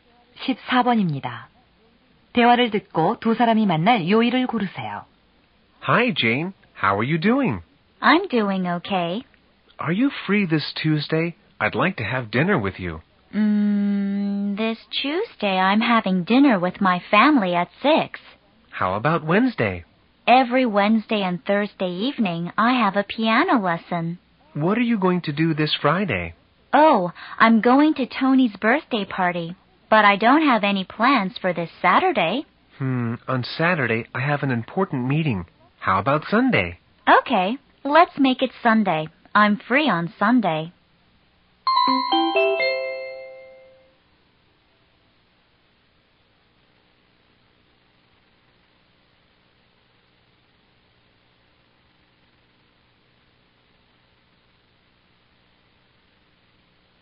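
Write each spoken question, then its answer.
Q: 대화를 듣고 두 사람이 만날 요일을 고르세요.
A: 일요일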